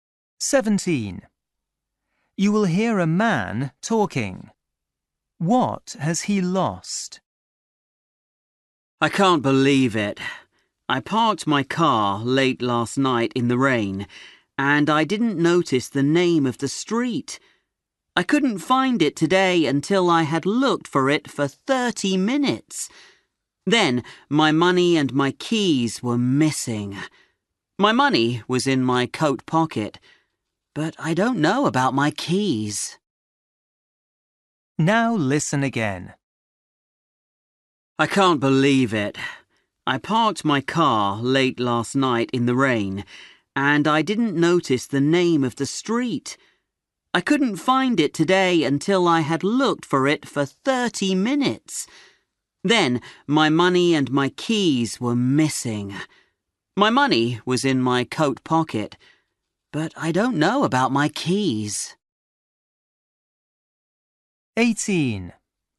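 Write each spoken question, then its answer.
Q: What has he lost?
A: his keys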